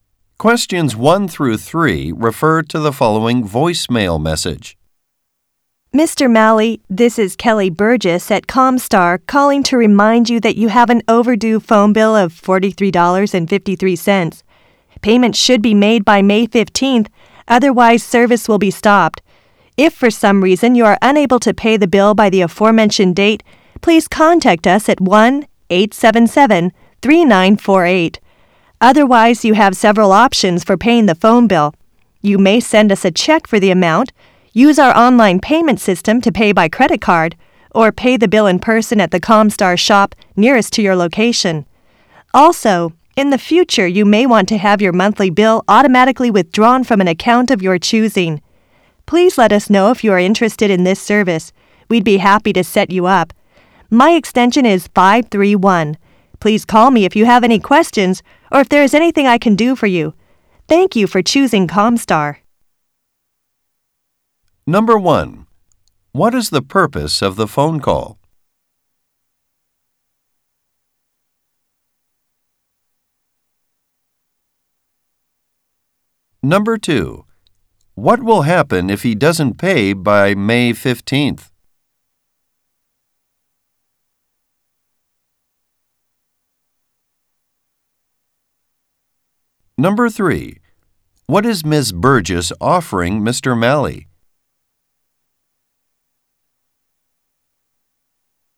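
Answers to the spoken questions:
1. To remind him of an overdue phone bill
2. His phone service will be stopped
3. To set up automatic monthly withdrawal of his bill from an account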